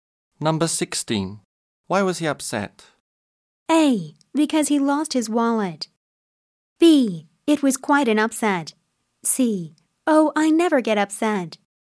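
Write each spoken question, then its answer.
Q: Why was he upset?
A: A: Because he lost his wallet.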